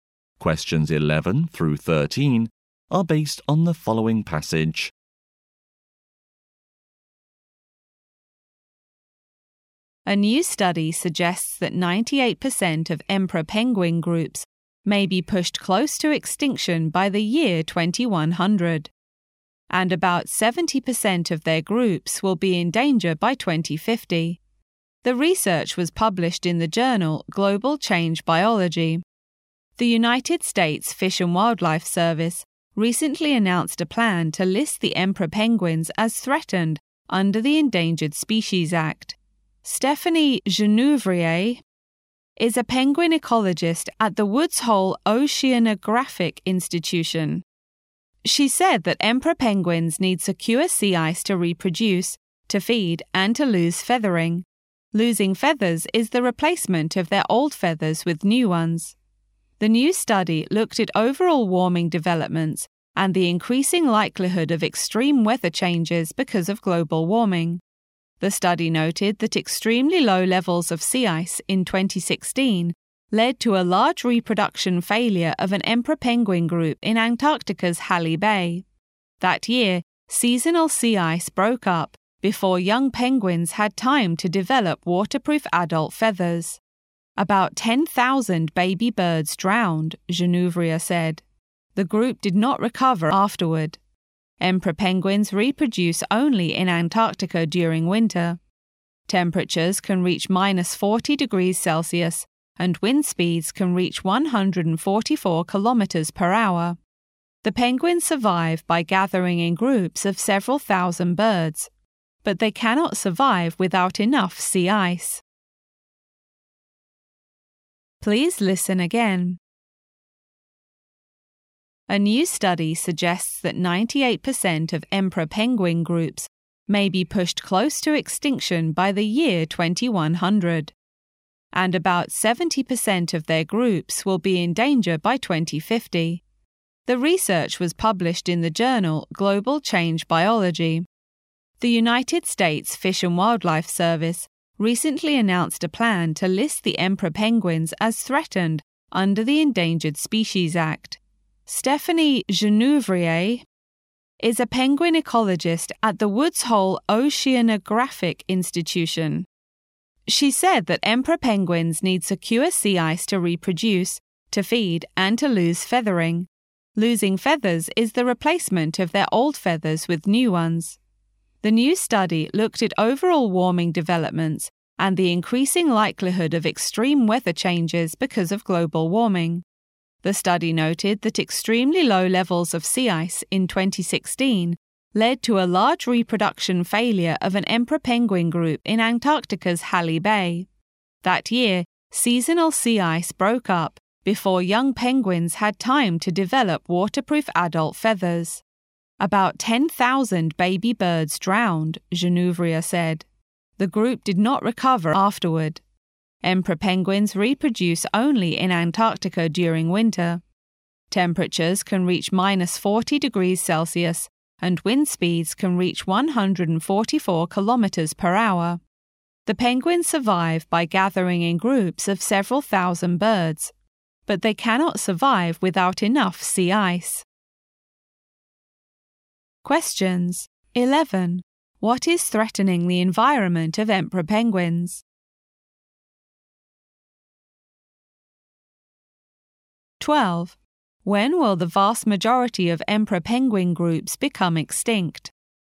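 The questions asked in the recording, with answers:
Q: What is threatening the environment of emperor penguins?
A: Global warming causing the loss of sea ice

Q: When will the vast majority of emperor penguin groups become extinct?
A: By 2100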